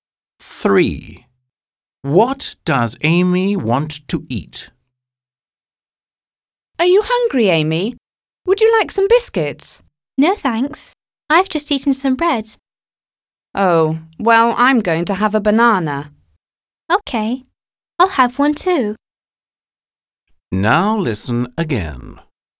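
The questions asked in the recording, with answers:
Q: What does Amy want to eat?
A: A banana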